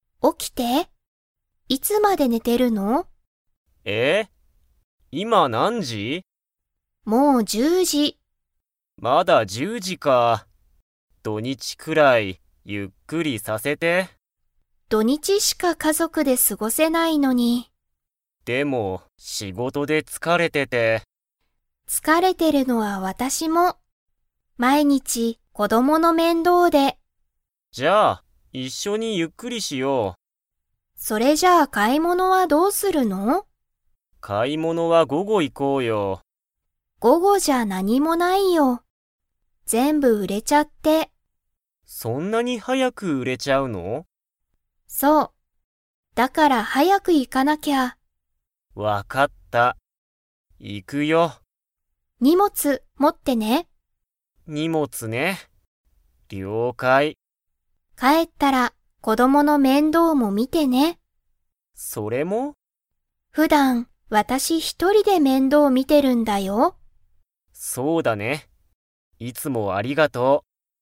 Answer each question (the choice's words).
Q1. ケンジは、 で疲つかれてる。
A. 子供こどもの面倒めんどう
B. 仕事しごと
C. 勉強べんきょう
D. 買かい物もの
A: 仕事しごと

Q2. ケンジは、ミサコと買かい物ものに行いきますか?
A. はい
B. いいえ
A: はい

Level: Level 4